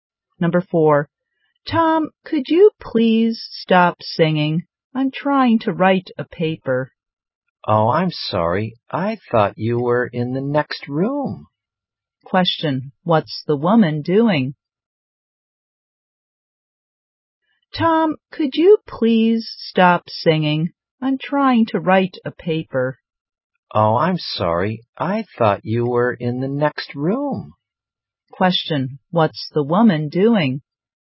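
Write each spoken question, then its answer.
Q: what's the woman doing?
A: Writing a paper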